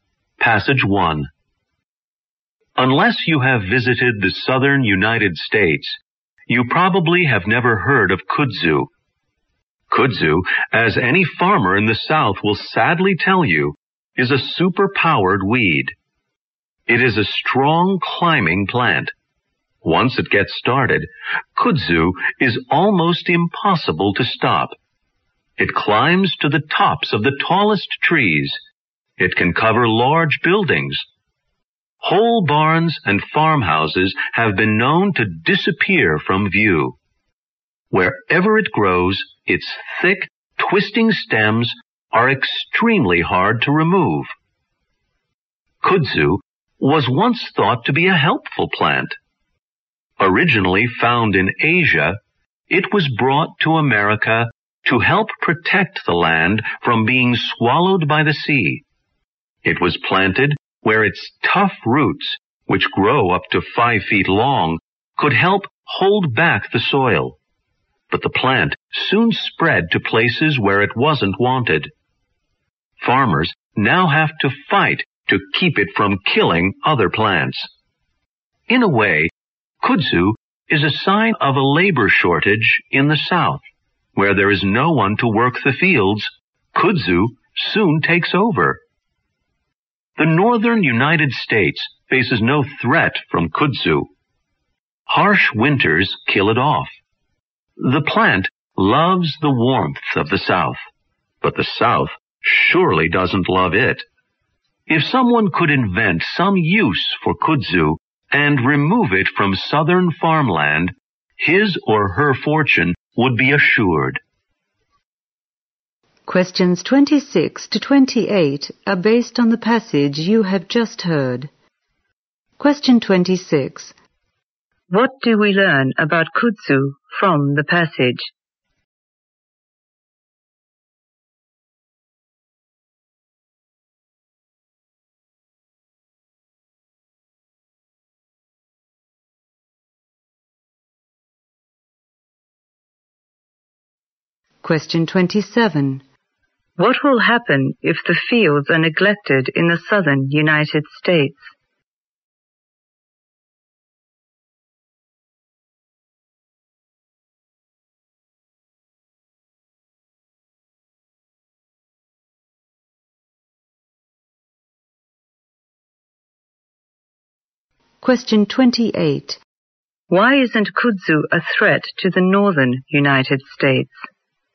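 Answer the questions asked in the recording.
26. It is a strong climbing weed that is very hard to get rid of.
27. Kudzu will soon take them over.
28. The harsh winters there kill it off.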